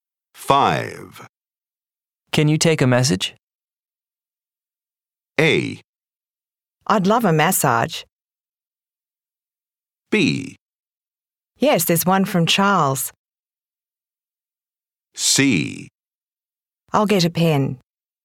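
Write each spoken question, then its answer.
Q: Can you take a message?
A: C: I'll get a pen.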